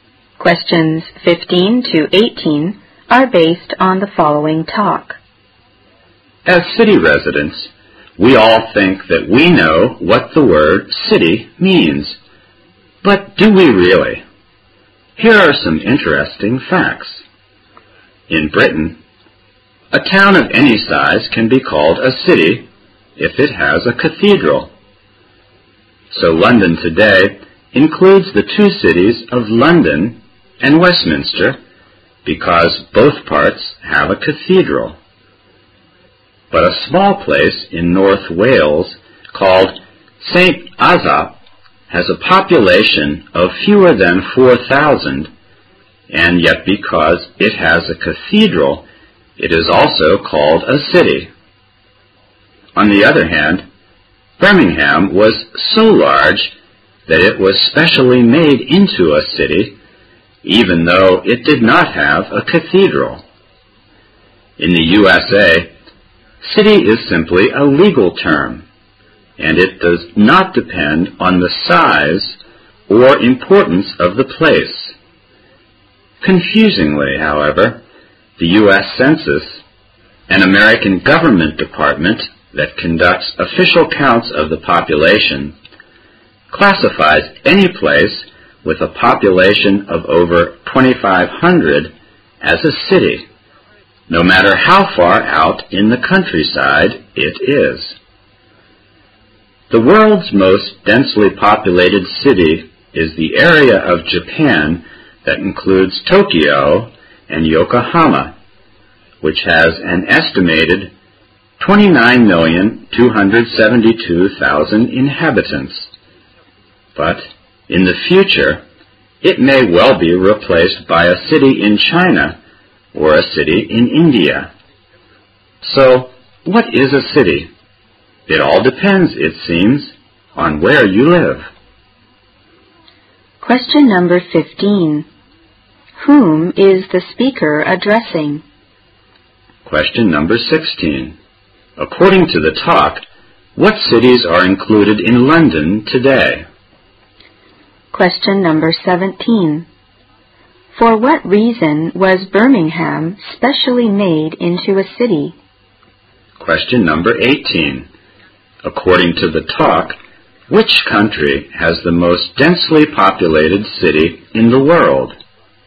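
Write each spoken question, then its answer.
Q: Whom is the speaker addressing?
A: City residents

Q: According to the talk, what cities are included in London today?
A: London and Westminster

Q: For what reason was Birmingham specially made into a city?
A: Because it was so large

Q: According to the talk, which country has the most densely populated city in the world?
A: Japan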